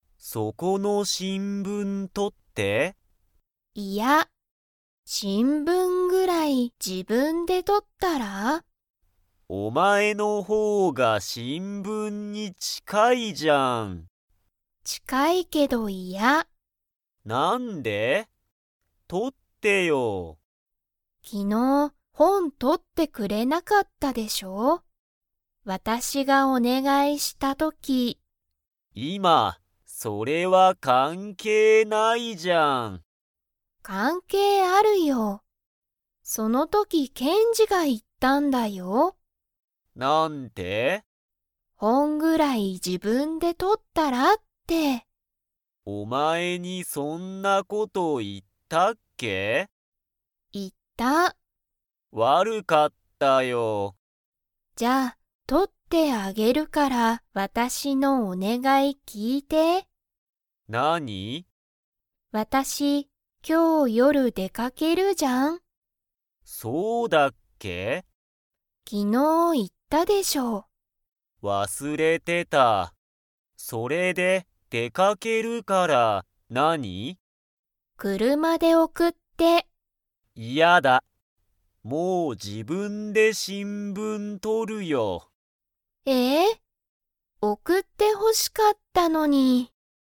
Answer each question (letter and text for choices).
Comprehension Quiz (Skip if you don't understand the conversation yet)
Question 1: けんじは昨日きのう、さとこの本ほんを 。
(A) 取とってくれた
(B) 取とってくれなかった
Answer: (B) 取とってくれなかった

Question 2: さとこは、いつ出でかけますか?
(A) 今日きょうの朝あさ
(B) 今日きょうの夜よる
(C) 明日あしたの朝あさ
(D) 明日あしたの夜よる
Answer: (B) 今日きょうの夜よる

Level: Level 3